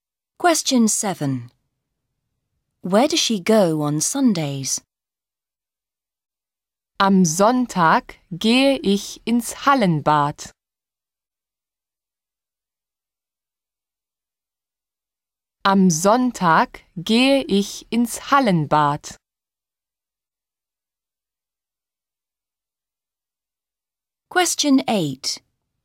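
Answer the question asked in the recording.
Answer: To the indoor swimming pool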